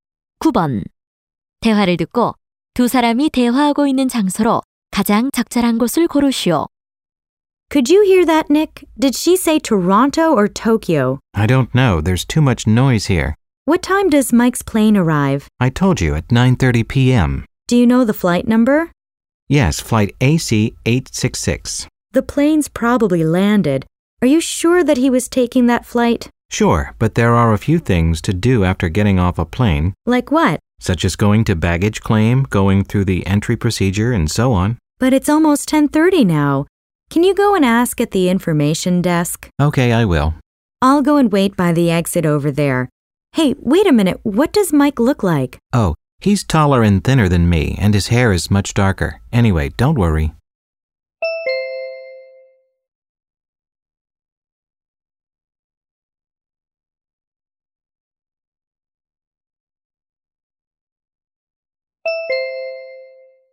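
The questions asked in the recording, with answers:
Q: 대화를 듣고 두 사람이 대화하고 있는 장소로 가장 적절한 곳을 고르시오.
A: 공항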